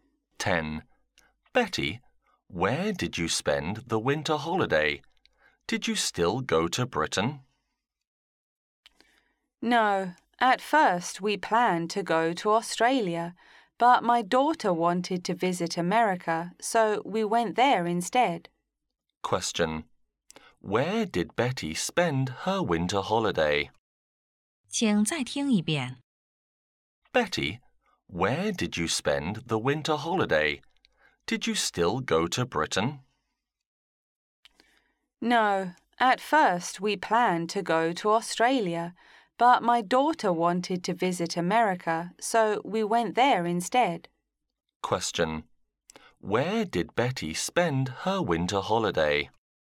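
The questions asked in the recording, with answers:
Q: Where did Betty spend her winter holiday?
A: In America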